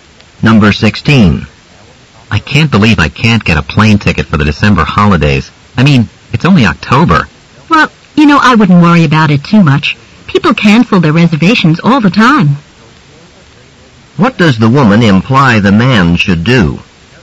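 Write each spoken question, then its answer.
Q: What does the woman imply the man should do?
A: Keep trying, since seats may open up from cancellations.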